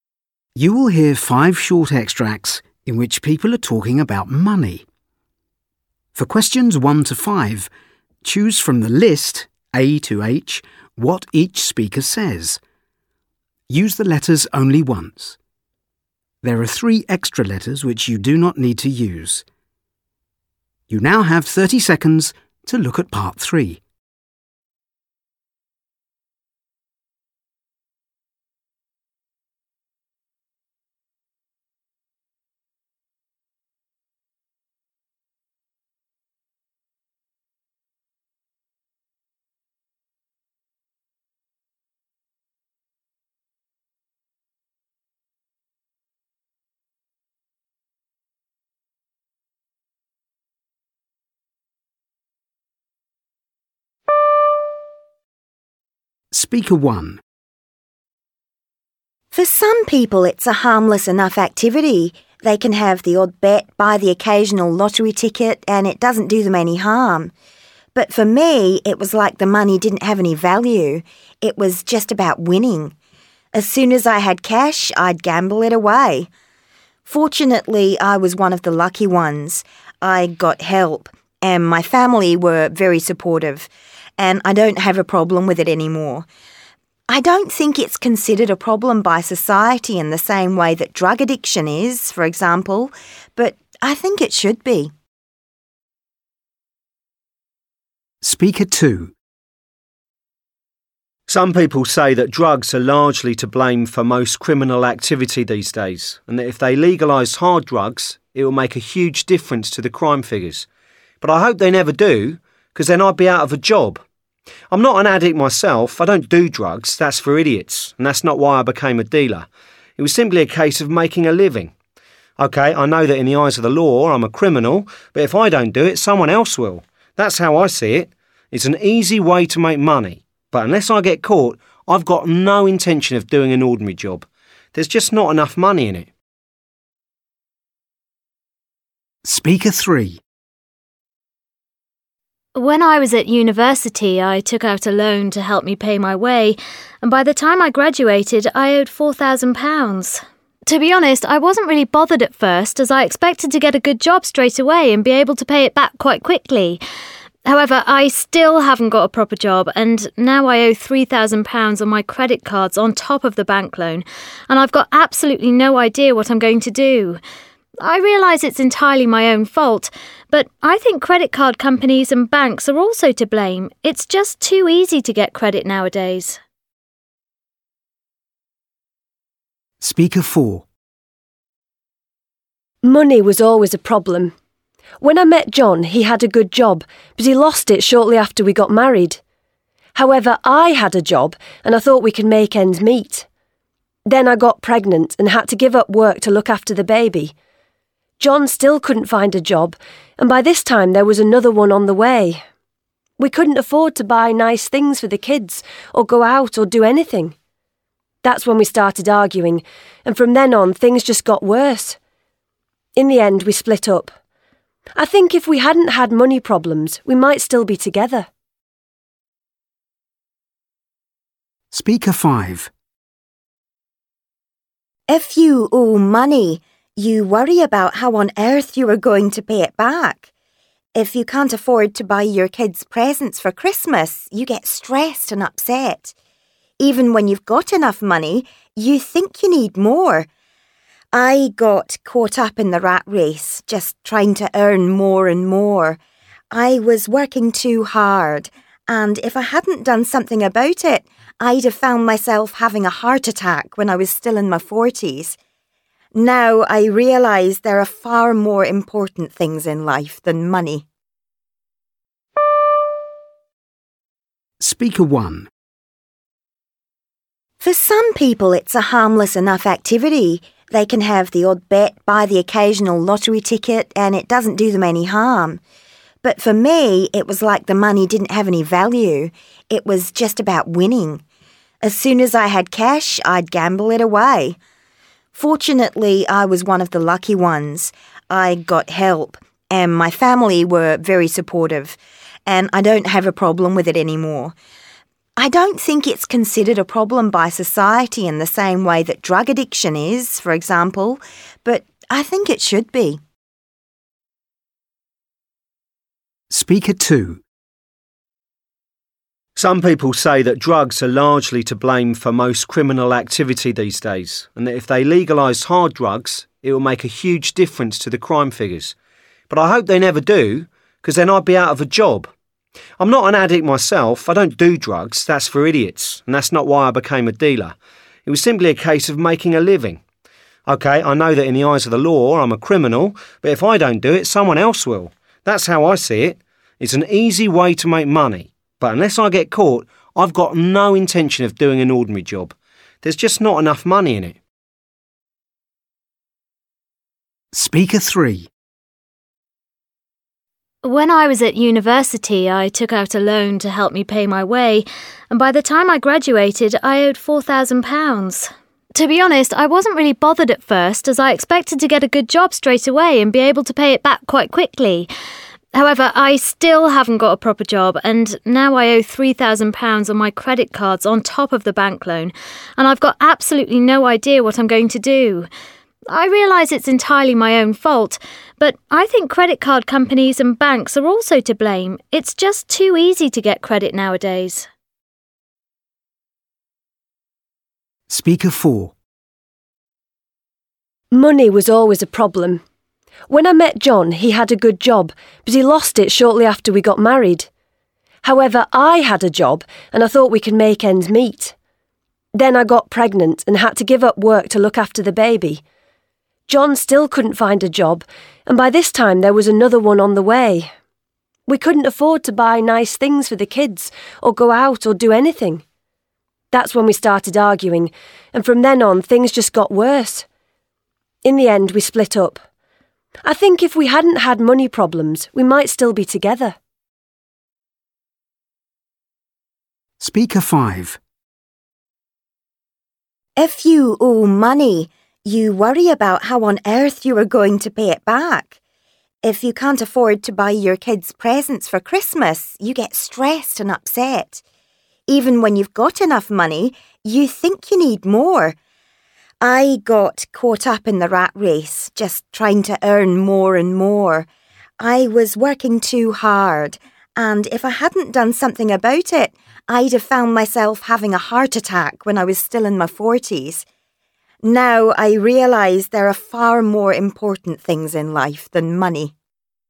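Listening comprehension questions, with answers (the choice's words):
You will hear five different people talking about money. For questions 19-23, choose from the list (A – H) what each speaker says. Use the letters only once. There are three extra letters which you do not need to use.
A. I accept responsibility for my problems.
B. I wouldn't want to earn less.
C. I was motivated by money in the past.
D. I don't intend to pay back what I owe.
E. Lack of money ruined my relationship.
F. I may have no moral conscience.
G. I never had money for long.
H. Money affected my health.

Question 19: Speaker 1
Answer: I never had money for long.

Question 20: Speaker 2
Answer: I wouldn't want to earn less.

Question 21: Speaker 3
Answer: I accept responsibility for my problems.

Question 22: Speaker 4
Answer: Lack of money ruined my relationship.

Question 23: Speaker 5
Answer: I was motivated by money in the past.

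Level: FCE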